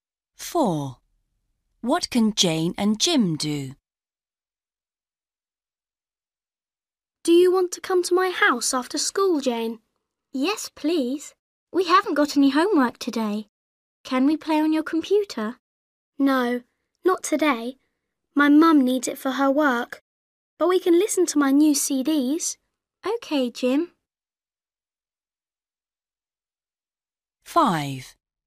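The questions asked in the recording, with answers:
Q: What can Jane and Jim do?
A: Listen to Jim's new CDs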